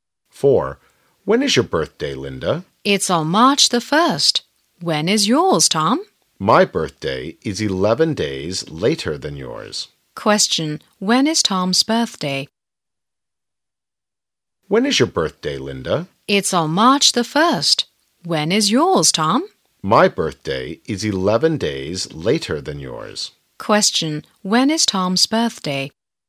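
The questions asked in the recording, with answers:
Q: When is Tom's birthday?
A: March the 12th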